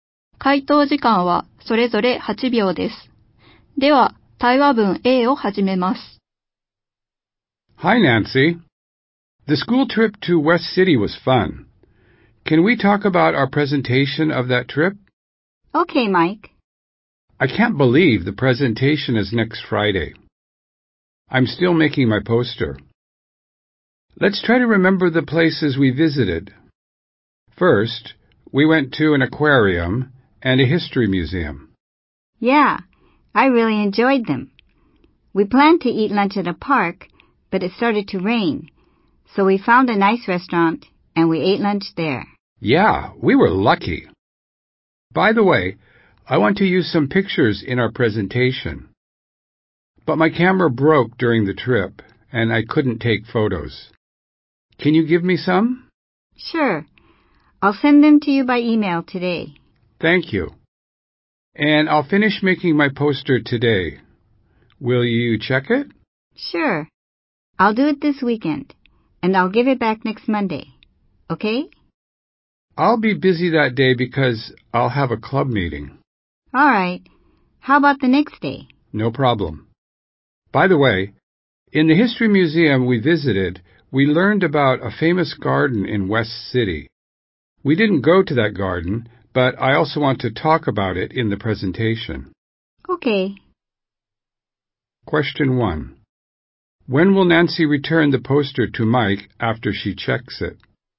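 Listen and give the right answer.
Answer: Next Tuesday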